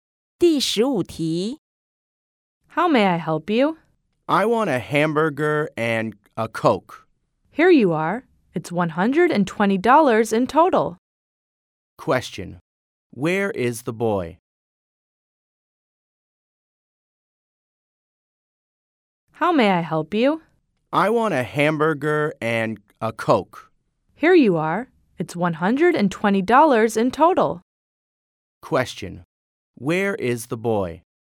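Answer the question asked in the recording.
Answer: At a fast food restaurant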